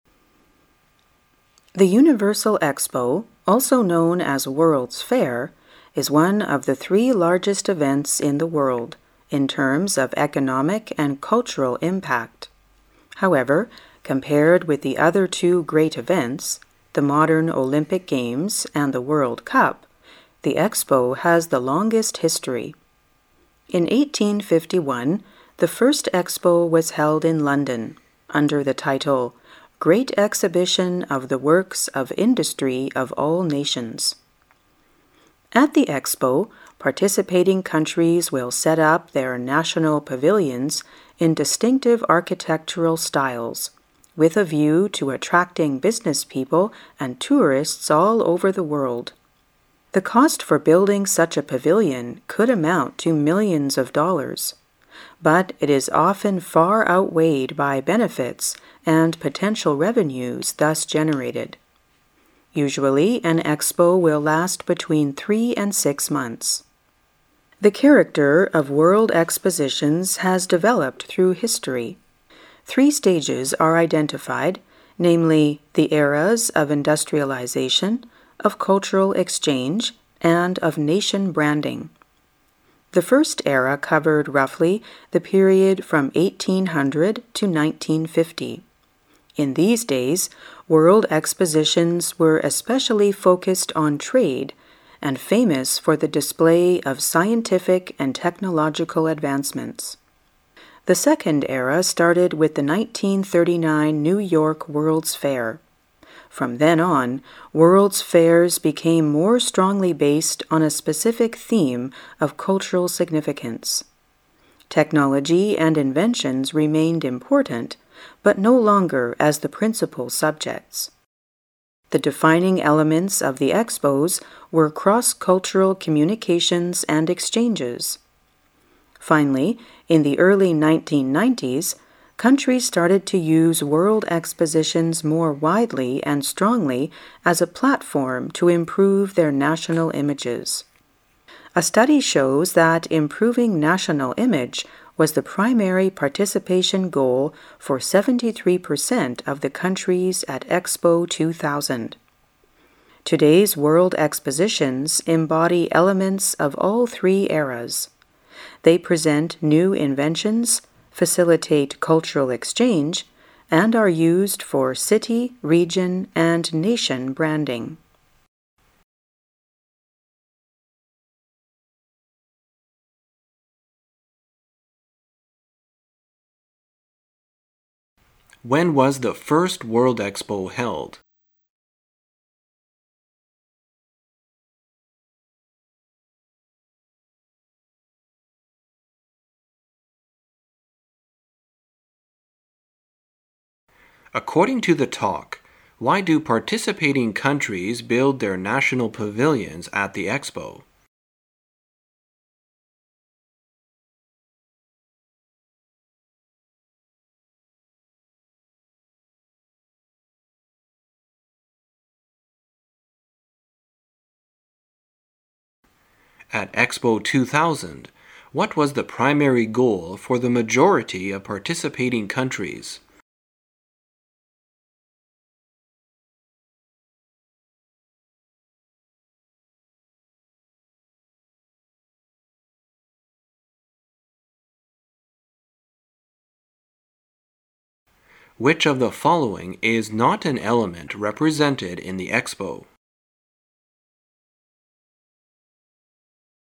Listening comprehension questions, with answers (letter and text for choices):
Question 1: According to the talk, why do participating countries build their national pavilions at the Expo?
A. To attract people all over the world.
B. To save millions of dollars in hotel accommodation.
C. To offset the imbalance in foreign trade.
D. To outweigh the benefits and potential revenues.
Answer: A. To attract people all over the world.

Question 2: At Expo 2000, what was the primary goal for the majority of participating countries?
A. To promote scientific exchanges.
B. To define cross-cultural communications.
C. To improve their national images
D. To display their technological advancements.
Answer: C. To improve their national images

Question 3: Which of the following is NOT an element represented in the Expo?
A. the presentation of new inventions.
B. the promotion of cultural exchanges.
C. the ambition of nation branding.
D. the creation of a universal language.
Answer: D. the creation of a universal language.

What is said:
[解析] 15-18 The Universal Expo, also known as World's Fair, is one of the three largest events in the world in terms of economic and cultural impact. However, compared with the other two great events, the modern Olympic Games and the World Cup, the Expo has the longest history. In 1851, the first Expo was held in London, under the title "Great Exhibition of the Works of Industry of All Nations". At the Expo, participating countries will set up their national pavilions in distinctive architectural styles, with a view to attracting business people and tourists all over the world. The cost for building such a pavilion could amount to millions of dollars. But it is often far outweighed by benefits and potential revenues thus generated. Usually an expo will last between three and six months. The character of world expositions has developed through history. Three stages are identified, namely, the eras of industrialization, of cultural exchange, and of nation branding. The first era covered, roughly, the period from 1800 to 1950. In these days, world expositions were especially focused on trade and famous for the display of scientific and technological advancements. The second era started with the 1939 New York World's Fair. From then on, World's Fairs became more strongly based on a specific theme of cultural significance. Technology and inventions remained important, but no longer as the principal subjects. The defining elements of the expos were cross-cultural communications and exchanges. Finally, in the early 1990s, countries started to use World Expositions more widely and strongly as a platform to improve their national images. A study shows that improving national image was the primary participation goal for 73% of the countries at Expo 2000. Today's world expositions embody elements ofall three eras. They present new inventions, facilitate cultural exchange, and are used for city, region and nation branding. When was the first World Expo held?